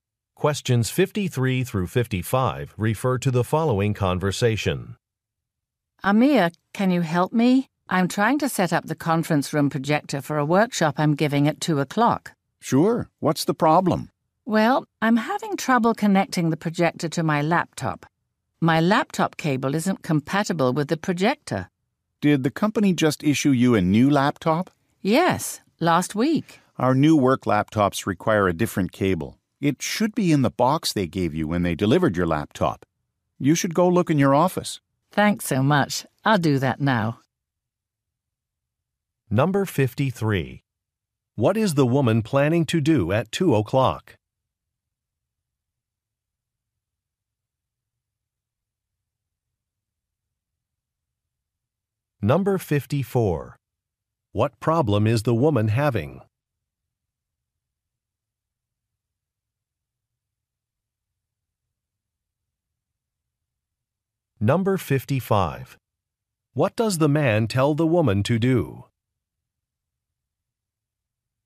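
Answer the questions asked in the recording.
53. Give a workshop
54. She can't connect the projector to her laptop
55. Look for the cable in her office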